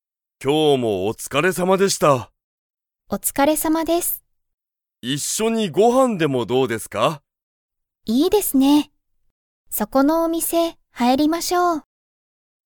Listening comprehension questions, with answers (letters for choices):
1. 松井(まつい)さんと吉田(よしだ)さんは、一緒(いっしょ)にご飯(はん)を食(た)べますか?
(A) はい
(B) いいえ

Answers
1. A

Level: Level 1